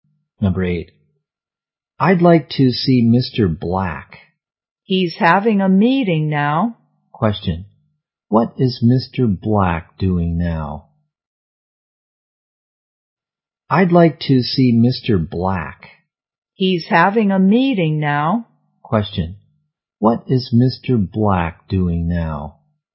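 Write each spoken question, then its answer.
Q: What is Mr. Black doing now?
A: Having a meeting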